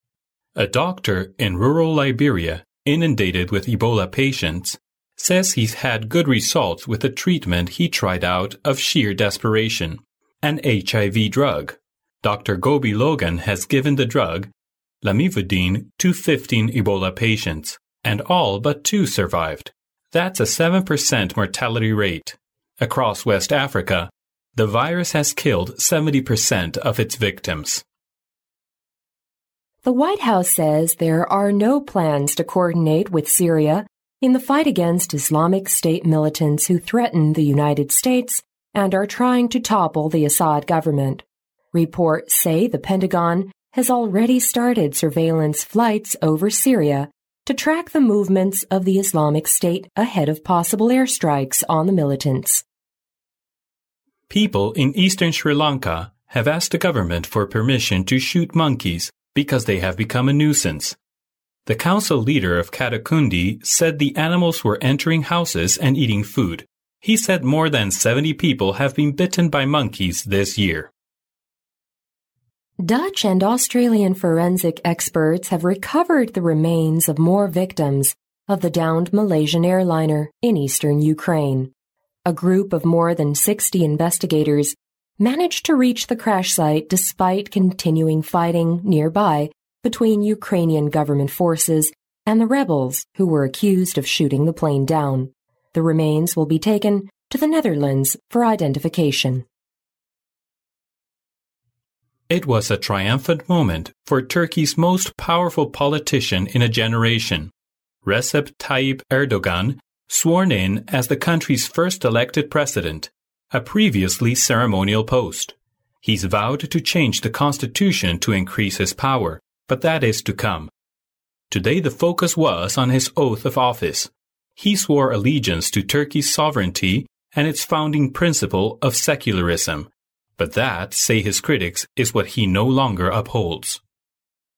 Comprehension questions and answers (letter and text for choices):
Section C In this section, you will hear five short news items. After each item, which will be read only once, there will be a twenty-second pause. During the pause, read the question and the four choices marked A, B, C and D, and decide which is the best answer. Then mark the corresponding letter on the answer sheet with a single line through the centre.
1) Who is trying to topple the Assad government?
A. Syrian.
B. Islamic State militants.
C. Pakistani.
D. The US.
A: B. Islamic State militants.

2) Why did the people ask for permission of shooting monkeys?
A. Their daily life is seriously disturbed by monkeys.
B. They are afraid of these annoying monkeys.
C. Their food and drinks have been stolen by monkeys.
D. The amount of monkeys is increasing rapidly.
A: A. Their daily life is seriously disturbed by monkeys.

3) Why does RecepTayyip Erdogan decide to change the constitution?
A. Because he is the country's first elected president.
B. Because he wants to strengthen his powers.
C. Because he wants to show allegiance to Turkey's sovereignty.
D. Because he emphasizes the founding principle of secularism.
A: B. Because he wants to strengthen his powers.

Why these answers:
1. 根据录音第一句"The White House says there are no plans...Islamic State militants who are trying to topple the Assad government"可知,伊斯兰国政府军试图推翻叙利亚阿萨德政府。因此选B项。
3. 根据录音中的"He's vowed to change the constitution to increase his power"可知,RecepTayyip Erdogan改变宪法是为了加强他的权力。因此选B项。

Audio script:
[听力原文] A doctor in rural Liberia inundated with Ebola patients says he's had good results with a treatment he tried out of sheer desperation: an HIV drug. Dr. Gobee Logan has given the drug, lamivudine, to 15 Ebola patients, and all but two survived. That's a 7% mortality rate. Across West Africa, the virus has killed 70% of its victims.
[听力原文] The White House says there are no plans to coordinate with Syria in the fight against Islamic State militants who threaten the United States and are trying to topple the Assad government. Reports say the Pentagon has already started surveillance flights over Syria to track the movements of the Islamic State ahead of possible airstrikes on the militants.
A
[听力原文] People in eastern Sri Lanka have asked the government for permission to shoot monkeys because they have become a nuisance. The council leader of Kattankudi said the animals were entering houses and eating food. He said more than 70 people have been bitten by monkeys this year.
A.The remains of victims of Malaysian Airliner haven't been recovered yet.
B.16 investigators have managed to reach the crash site of Malaysian Airliner.
[听力原文] Dutch and Australian forensic experts have recovered the remains of more victims of the downed Malaysian Airliner in eastern Ukraine. A group of more than 60 investigators managed to reach the crash site despite continuing fighting nearby between Ukrainian government forces and the rebels who were accused of shooting the plane down. The remains will be taken to the Netherlands for identification.
[听力原文] It was a triumphant moment for Turkey's most powerful politician in a generation—Recep Tayyip Erdogan sworn in as the country's first elected president, a previously ceremonial post. He's vowed to change the constitution to increase his power, but that is to come. Today the focus was on his oath of office. He swore allegiance to Turkey's sovereignty and its founding principle of secularism. But that, say his critics, is what he no longer upholds.